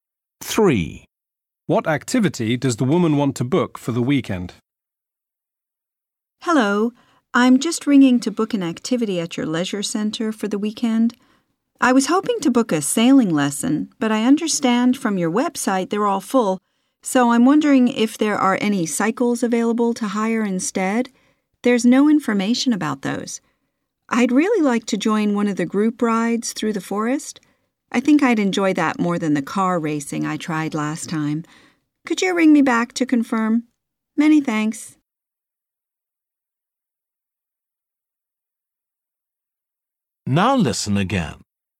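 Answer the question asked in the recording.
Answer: cycling (a group bike ride)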